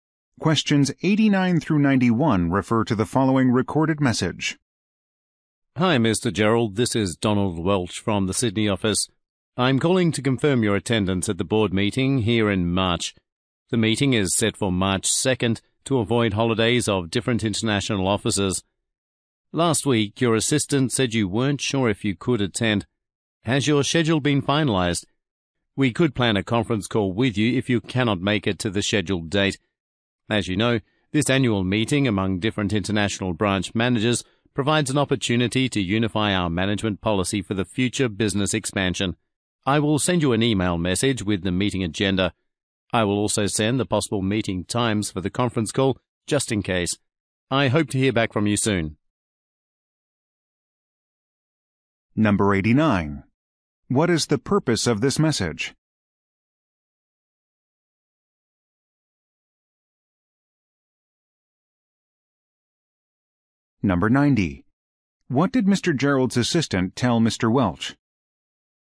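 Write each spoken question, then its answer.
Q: What is the purpose of this message?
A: To confirm attendance at the board meeting

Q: What did Mr. Gerald's assistant tell Mr.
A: That Mr. Gerald wasn't sure if he could attend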